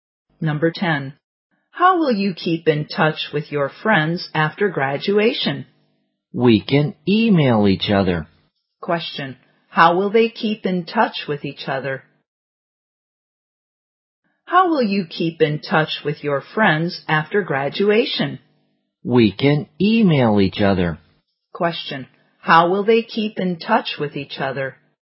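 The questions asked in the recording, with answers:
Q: How will they keep in touch with each other?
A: By email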